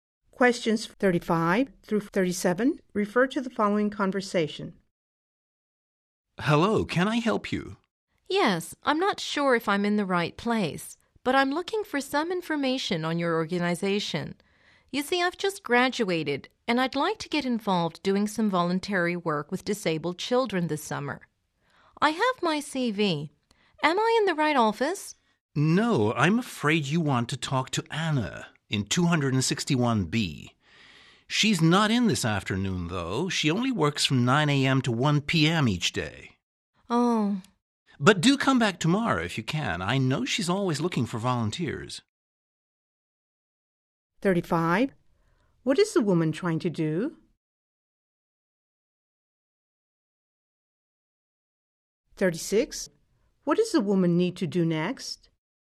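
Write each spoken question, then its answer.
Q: What is the woman trying to do?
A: Get information about volunteering with disabled children

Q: What does the woman need to do next?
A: Come back tomorrow to talk to Anna in 261B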